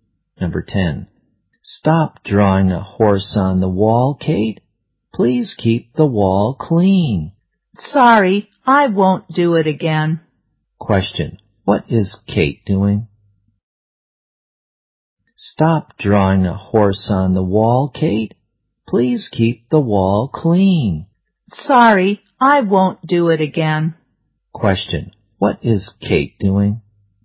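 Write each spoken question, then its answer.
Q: Question. What is Kate doing?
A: Drawing a horse on the wall.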